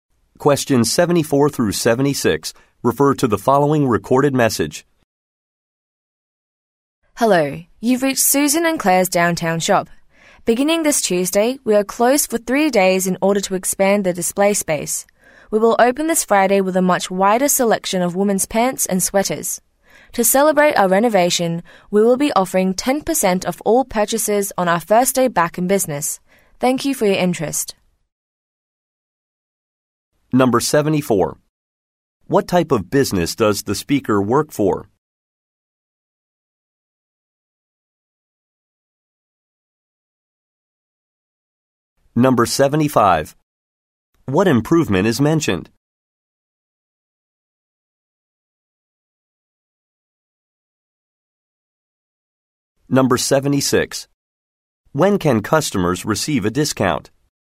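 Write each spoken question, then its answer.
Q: What type of business does the speaker work for?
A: A women's clothing store

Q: What improvement is mentioned?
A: Expanded display space

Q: When can customers receive a discount?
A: On Friday, the first day of reopening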